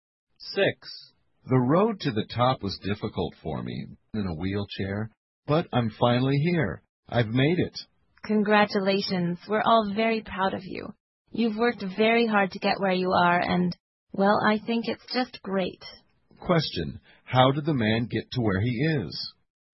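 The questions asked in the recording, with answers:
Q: How did the man get to where he is?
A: By working very hard.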